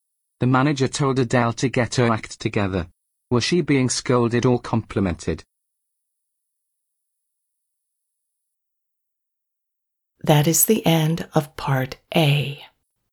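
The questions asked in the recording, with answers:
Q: Was she being scolded or complimented?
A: scolded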